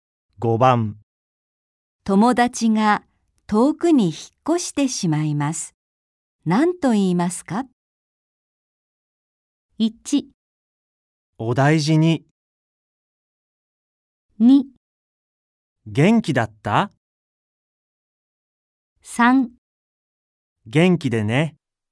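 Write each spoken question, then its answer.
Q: 友達が遠くに引っ越してしまいます。何と言いますか?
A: 3: 元気でね。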